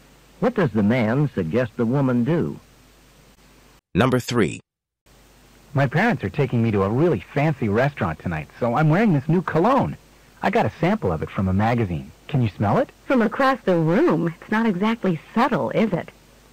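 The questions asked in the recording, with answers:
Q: What does the woman mean?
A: The cologne is too strong.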